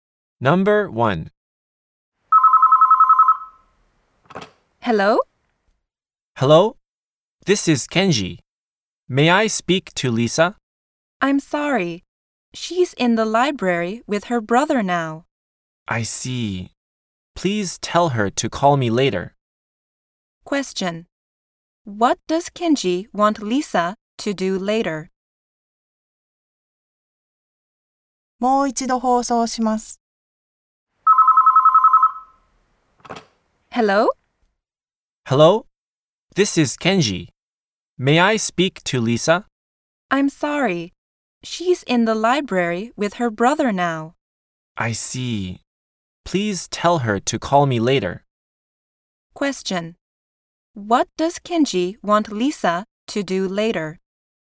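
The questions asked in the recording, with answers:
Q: What does Kenji want Lisa to do later?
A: To call him.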